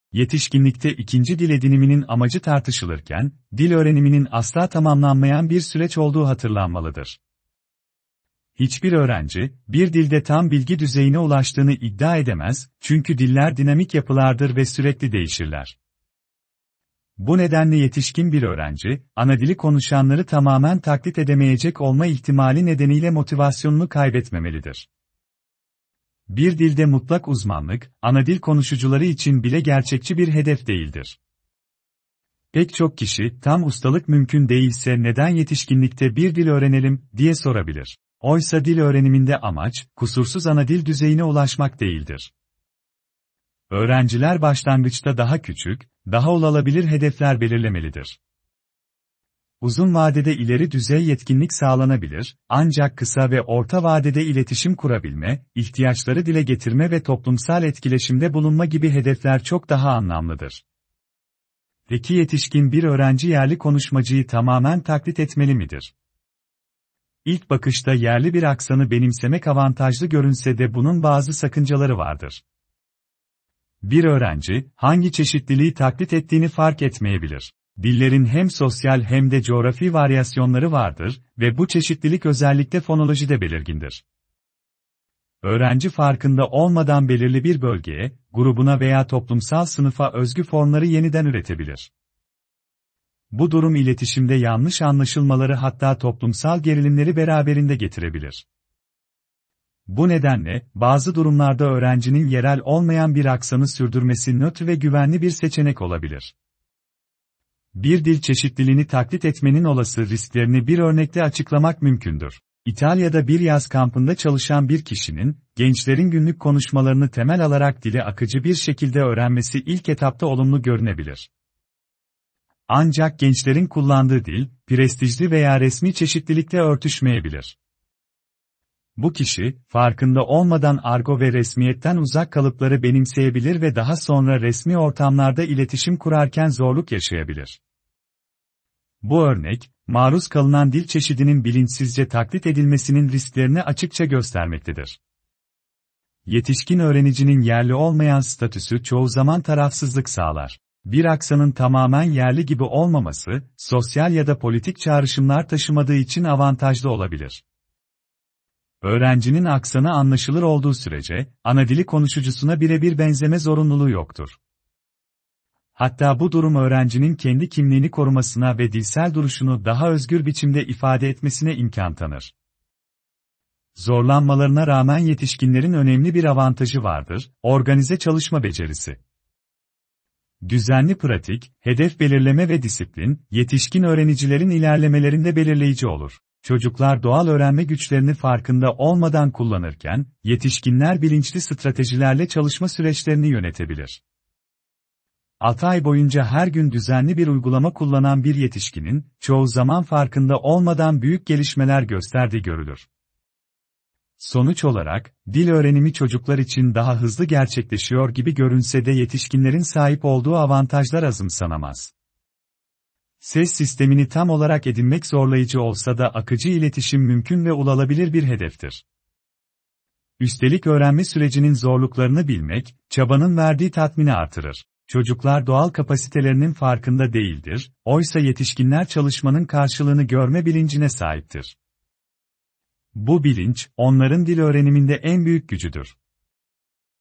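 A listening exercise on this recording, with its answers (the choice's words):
Dinleyiniz ve aşağıdaki soruları metne uygun olarak cevaplayınız.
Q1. Metne göre yetişkin bir öğrencinin motivasyonunu kaybetmemesi gereken temel gerekçe nedir?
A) Anadili konuşucularını kısa sürede tamamen taklit edebilmesi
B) Dillerin sürekli değişen yapılar olması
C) Her öğrencinin tam bilgi düzeyine ulaşabilmesi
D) Yetişkinlerin fonolojiyi çocuklardan daha iyi öğrenmesi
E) Anadili konuşucularının da mutlak uzmanlığa sahip olması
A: Dillerin sürekli değişen yapılar olması

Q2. Metne göre yetişkinler için kısa ve orta vadede en anlamlı hedef aşağıdakilerden hangisidir?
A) Anadili konuşucusuna özgü aksanı kısa sürede edinmek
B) Dilin resmi tüm çeşitliliklerini ezberlemek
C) Tam ustalık yerine iletişim kurabilme becerilerini geliştirmek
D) Sosyal varyasyonları ayrıntılı biçimde analiz etmek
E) Kısa sürede yerli konuşmacı kadar akıcı olmak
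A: Tam ustalık yerine iletişim kurabilme becerilerini geliştirmek

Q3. Metinde dile getirilen aksan konusuna göre, yetişkin bir öğrencinin yerli aksanı birebir taklit etmeye çalışmasının hangi riski bulunmaktadır?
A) Aksanın daha kolay öğrenilmesini sağlaması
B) Sosyal veya coğrafi bir çeşidi farkında olmadan yeniden üretmesi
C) Resmî dilde daha hızlı ilerlemesine yardımcı olması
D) Diğer öğrenicilere göre daha çok kelime öğrenmesi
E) İletişimde daha rahat hissetmesi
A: Sosyal veya coğrafi bir çeşidi farkında olmadan yeniden üretmesi

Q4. İtalya'daki yaz kampı örneği aşağıdaki durumlardan hangisini açıklamak için kullanılmıştır?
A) Argo ifadelerin öğrenmeyi tamamen engellediğini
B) Yetişkinlerin çocuklardan daha hızlı öğrendiğini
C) Maruz kalınan dil çeşidinin bilinçsizce taklit edilmesinin sorun oluşturabileceğini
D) Gençlerin dilinin her zaman prestijli olduğunu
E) Öğrencilerin yalnızca resmi çeşitliliği kullanması gerektiğini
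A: Maruz kalınan dil çeşidinin bilinçsizce taklit edilmesinin sorun oluşturabileceğini

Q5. Metne göre yetişkinlerin çocuklara göre sahip olduğu en önemli avantaj aşağıdakilerden hangisidir?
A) Fonolojiyi kolayca edinmeleri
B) Dile doğal olarak maruz kalmaları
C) Öğrenme sürecini bilinçli ve organize biçimde yönetebilmeleri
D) Kısa sürede yerli aksan kazanabilmeleri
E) Dil değişimlerini hızlıca benimseyebilmeleri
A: Öğrenme sürecini bilinçli ve organize biçimde yönetebilmeleri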